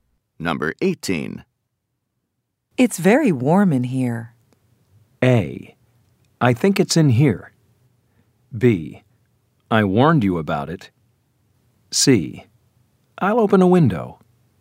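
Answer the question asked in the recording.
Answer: C: I'll open a window.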